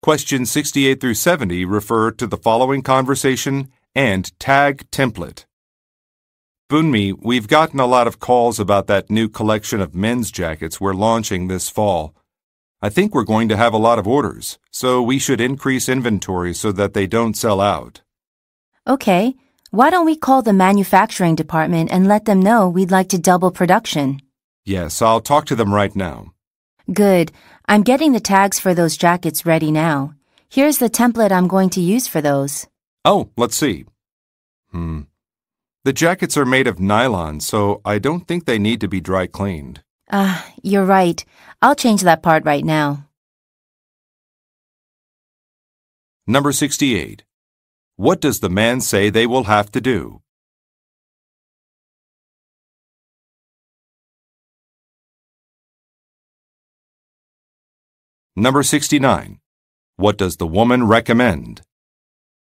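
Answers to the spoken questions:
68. Increase inventory so the jackets don't sell out
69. Calling the manufacturing department to double production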